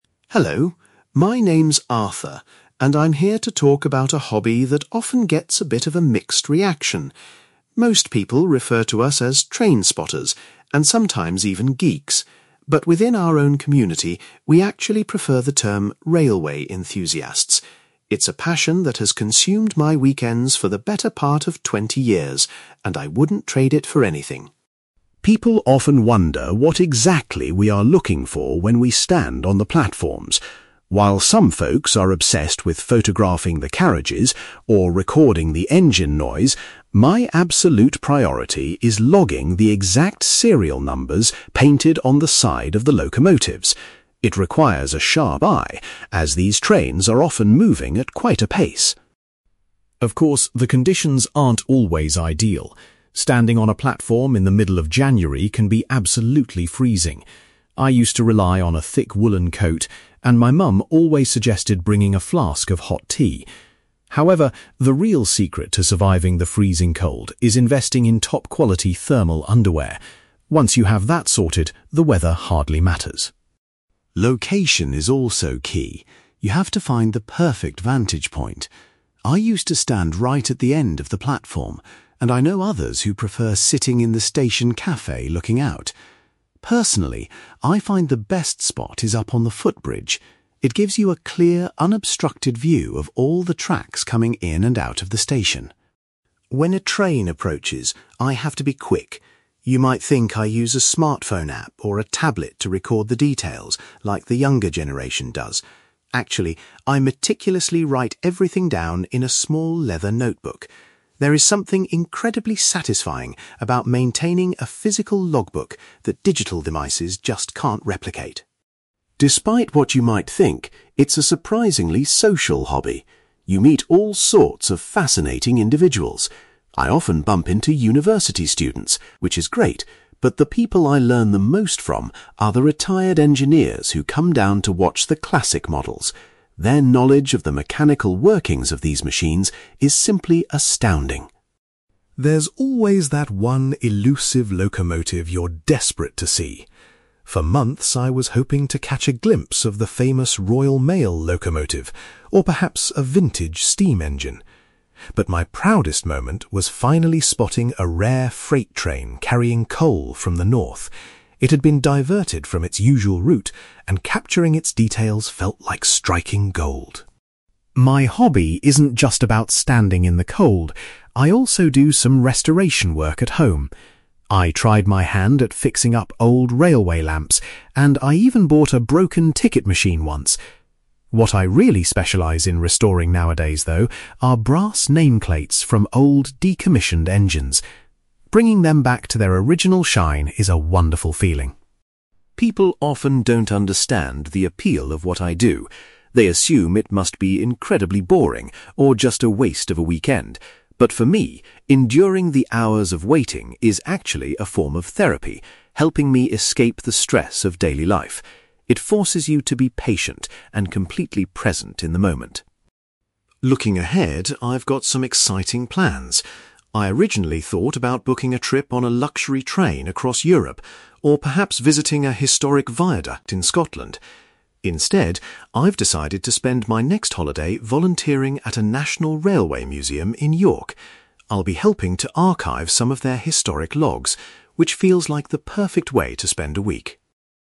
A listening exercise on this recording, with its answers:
You will hear a man called Arthur giving a talk about his hobby of trainspotting. For questions 9-18, complete the sentences with a word or short phrase.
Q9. Arthur says that people who share his hobby like to be known as (9)........................... .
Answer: railway enthusiasts

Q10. The main thing that Arthur tries to record is the (10)........................... of the trains.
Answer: serial numbers

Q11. Arthur believes that wearing (11)........................... is the best way to stay warm during winter.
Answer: thermal underwear

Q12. Arthur prefers to do his trainspotting from the (12)........................... at the station.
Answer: footbridge

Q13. Arthur uses a (13)........................... to keep a record of his train sightings.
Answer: leather notebook

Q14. Arthur particularly enjoys talking to the (14)........................... he meets at the station.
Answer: retired engineers

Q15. Arthur was extremely proud when he managed to see a rare (15)........................... passing through.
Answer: freight train

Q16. At home, Arthur spends his time fixing up (16)........................... from old locomotives.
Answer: brass nameplates

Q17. Arthur describes the long hours spent waiting for trains as a kind of (17)........................... .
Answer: therapy

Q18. For his next holiday, Arthur is planning to volunteer at a (18)........................... .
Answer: railway museum

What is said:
Arthur: Hello, my name's Arthur, and I'm here to talk about a hobby that often gets a bit of a mixed reaction. Most people refer to us as trainspotters, and sometimes even geeks, but within our own community, we actually prefer the term railway enthusiasts. It's a passion that has consumed my weekends for the better part of twenty years, and I wouldn't trade it for anything.
People often wonder what exactly we are looking for when we stand on the platforms. While some folks are obsessed with photographing the carriages, or recording the engine noise, my absolute priority is logging the exact serial numbers painted on the side of the locomotives. It requires a sharp eye, as these trains are often moving at quite a pace!
Of course, the conditions aren't always ideal. Standing on a platform in the middle of January can be absolutely freezing. I used to rely on a thick woollen coat, and my mum always suggested bringing a flask of hot tea. However, the real secret to surviving the freezing cold is investing in top-quality thermal underwear. Once you have that sorted, the weather hardly matters.
Location is also key. You have to find the perfect vantage point. I used to stand right at the end of the platform, and I know others who prefer sitting in the station café looking out. Personally, I find the best spot is up on the footbridge. It gives you a clear, unobstructed view of all the tracks coming in and out of the station.
When a train approaches, I have to be quick. You might think I use a smartphone app or a tablet to record the details like the younger generation does. Actually, I meticulously write everything down in a small leather notebook. There is something incredibly satisfying about maintaining a physical logbook that digital devices just can't replicate.
Despite what you might think, it's a surprisingly social hobby. You meet all sorts of fascinating individuals. I often bump into university students, which is great, but the people I learn the most from are the retired engineers who come down to watch the classic models. Their knowledge of the mechanical workings of these machines is simply astounding.
There's always that one elusive locomotive you're desperate to see. For months, I was hoping to catch a glimpse of the famous Royal Mail locomotive, or perhaps a vintage steam engine. But my proudest moment was finally spotting a rare freight train carrying coal from the north. It had been diverted from its usual route, and capturing its details felt like striking gold.
My hobby isn't just about standing in the cold; I also do some restoration work at home. I tried my hand at fixing up old railway lamps, and I even bought a broken ticket machine once. What I really specialise in restoring nowadays, though, are brass nameplates from old, decommissioned engines. Bringing them back to their original shine is a wonderful feeling.
People often don't understand the appeal of what I do. They assume it must be incredibly boring, or just a waste of a weekend. But for me, enduring the hours of waiting is actually a form of therapy, helping me escape the stress of daily life. It forces you to be patient and completely present in the moment.
Looking ahead, I've got some exciting plans. I originally thought about booking a trip on a luxury train across Europe, or perhaps visiting a historic viaduct in Scotland. Instead, I've decided to spend my next holiday volunteering at a national railway museum in York. I'll be helping to archive some of their historic logs, which feels like the perfect way to spend a week.

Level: B2